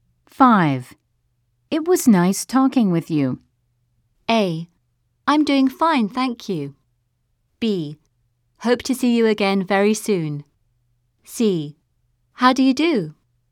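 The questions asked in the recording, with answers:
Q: It was nice talking with you.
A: B: Hope to see you again very soon.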